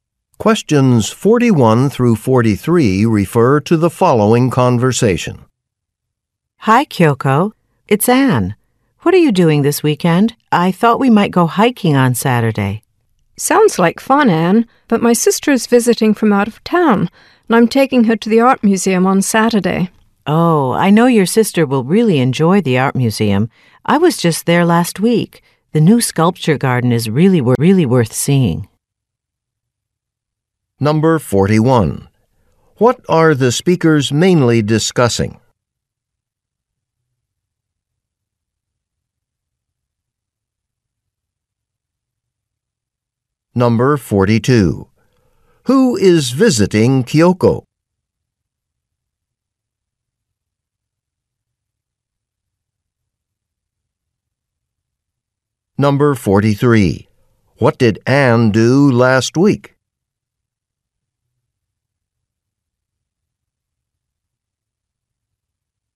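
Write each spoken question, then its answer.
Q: What are the speakers mainly discussing?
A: Weekend plans

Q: Who is visiting Kyoko?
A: Her sister

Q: What did Anne do last week?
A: She went to the art museum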